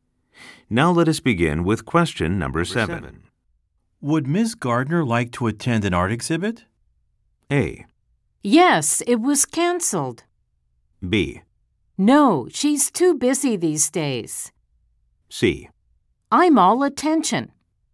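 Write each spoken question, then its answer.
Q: Would Ms. Gardner like to attend an art exhibit?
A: B: No, she's too busy these days.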